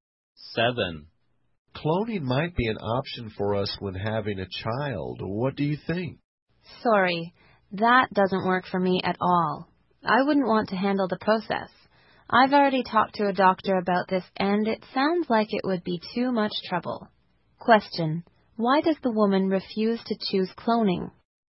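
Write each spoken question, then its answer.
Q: why does the woman refuse to choose cloning?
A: It would be too much trouble.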